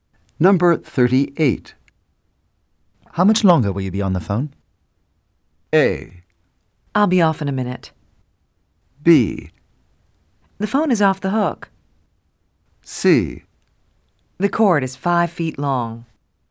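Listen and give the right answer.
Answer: A: I'll be off in a minute.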